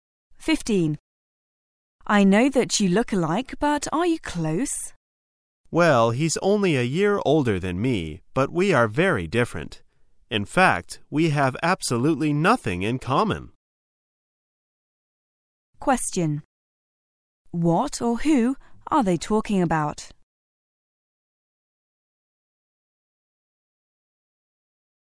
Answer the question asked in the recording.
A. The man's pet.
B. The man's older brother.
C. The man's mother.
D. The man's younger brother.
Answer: B. The man's older brother.

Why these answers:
此题考查通过内容推测的能力。解题的关键在于听到are you close?与he's only one year older than me,are you close?意为"你们有血缘关系吗"。

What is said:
[解析] W: I know that you look alike, but are you close? M: Well, he's only a year older than me but we are very different. In fact, we have absolutely nothing in common. Q: What/Who are they talking about?